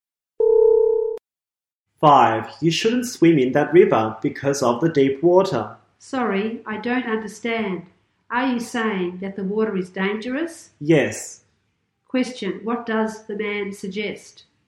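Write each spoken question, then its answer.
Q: Question. What does the man suggest?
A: Not to swim in the river because the water is deep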